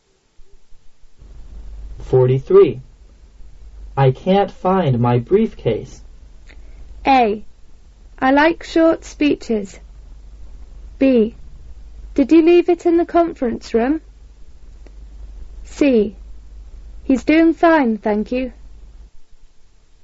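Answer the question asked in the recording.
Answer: B: Did you leave it in the conference room?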